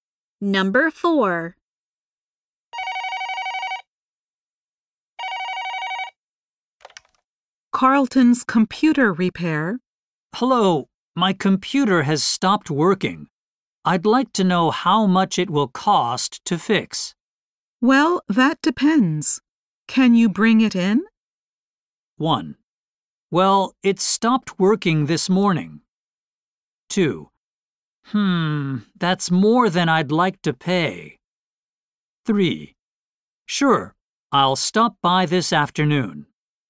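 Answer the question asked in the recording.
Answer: 3: Sure, I'll stop by this afternoon.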